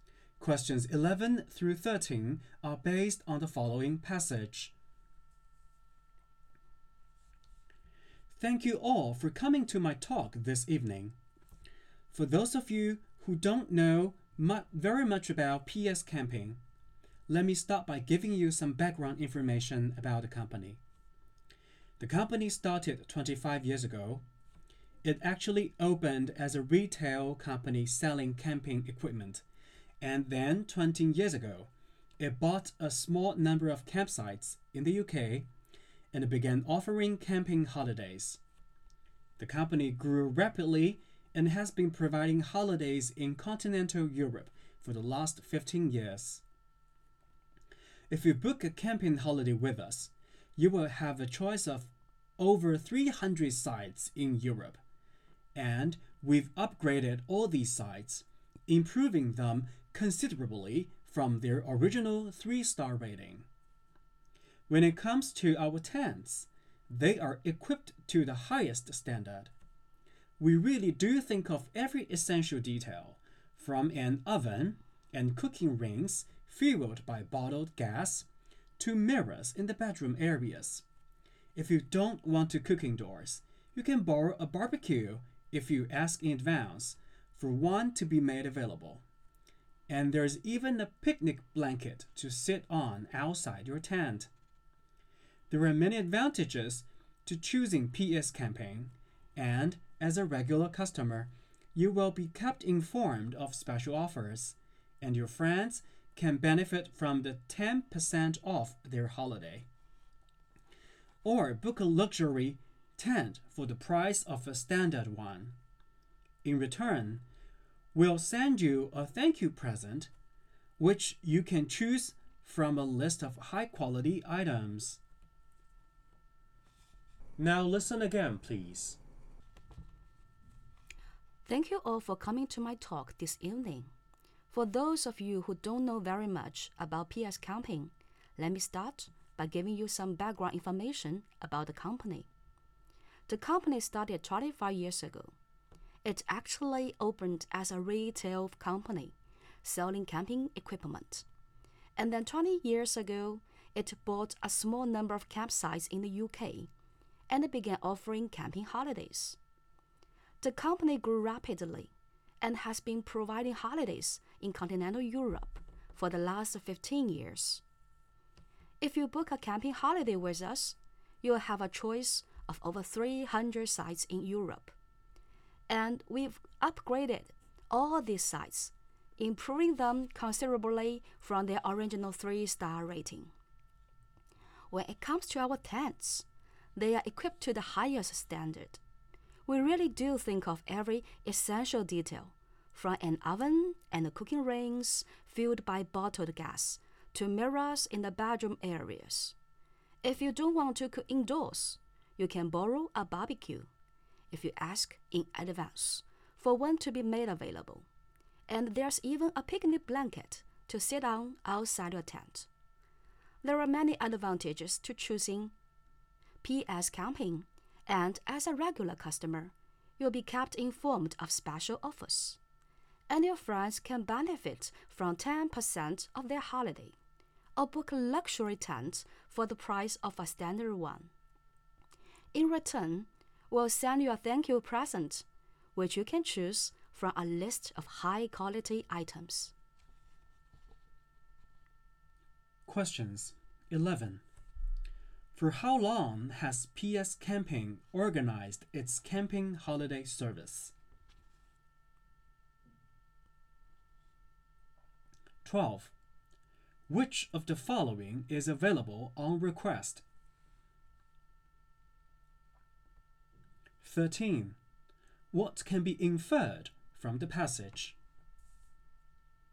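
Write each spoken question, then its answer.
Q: Which of the following is available on request?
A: A barbecue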